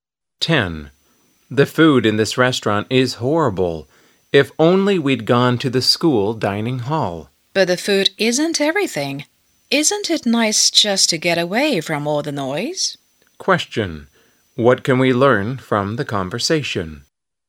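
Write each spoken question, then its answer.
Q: What can we learn from the conversation?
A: The restaurant's food is bad but it is quiet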